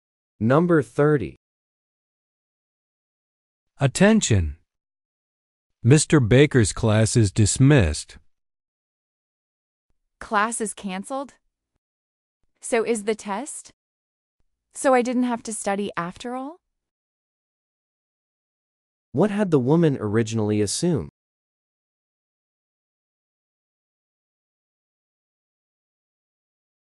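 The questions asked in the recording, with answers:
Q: What had the woman originally assumed?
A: That there would be a test in Mr. Baker's class.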